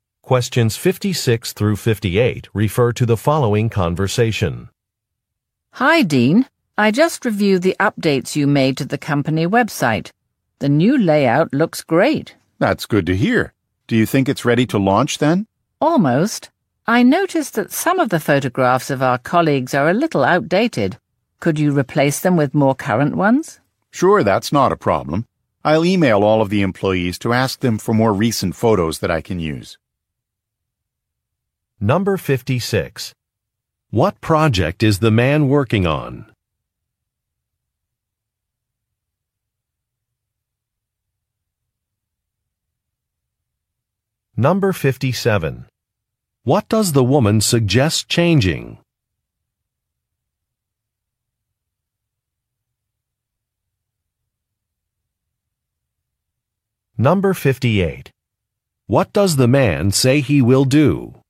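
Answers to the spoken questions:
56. Updating the company website
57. Some outdated photographs of colleagues
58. Email employees to ask for recent photos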